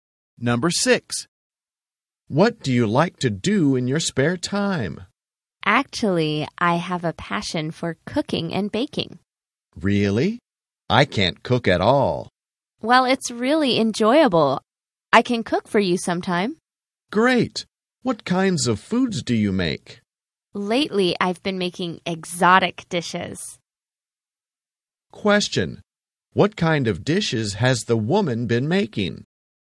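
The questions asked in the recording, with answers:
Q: What kind of dishes has the woman been making?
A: Exotic dishes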